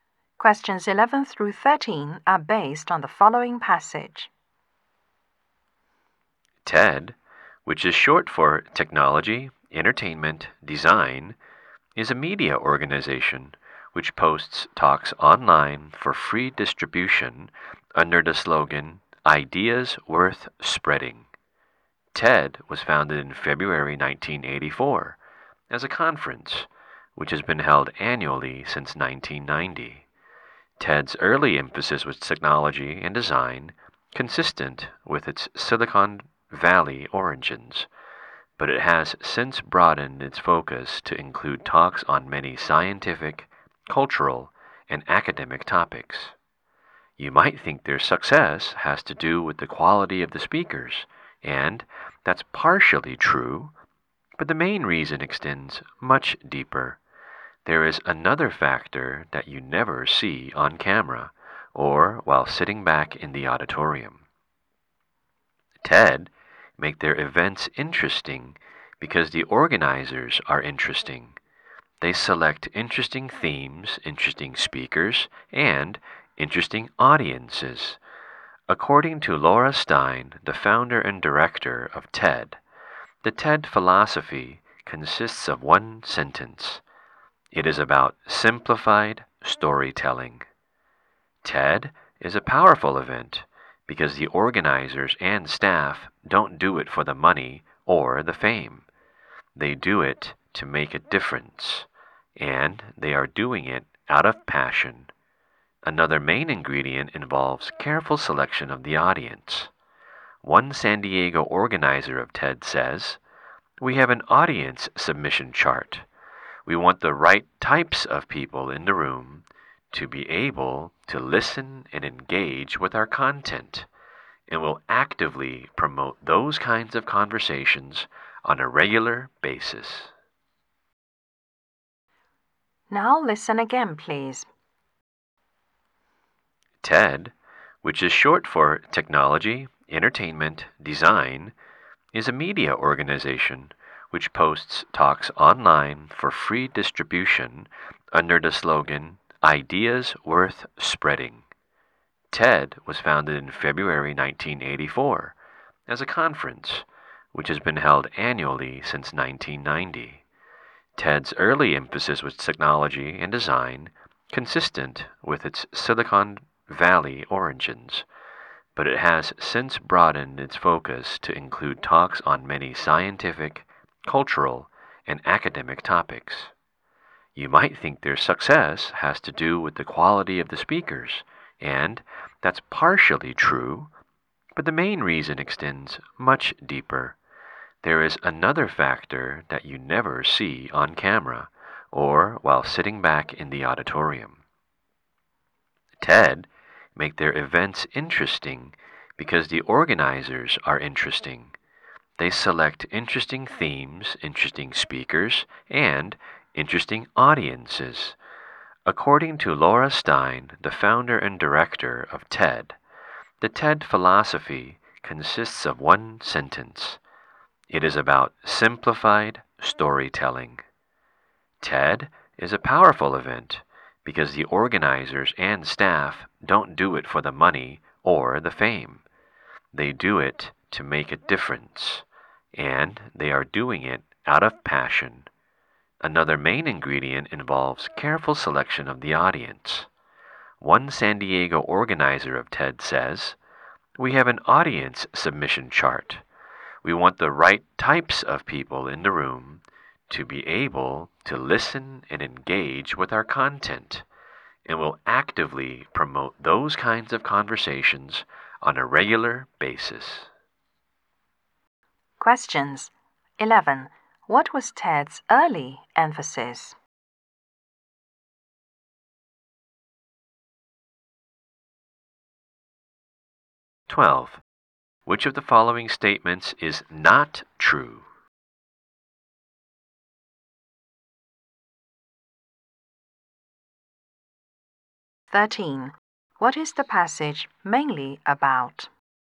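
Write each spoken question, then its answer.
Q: What was TED's early emphasis?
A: Technology and design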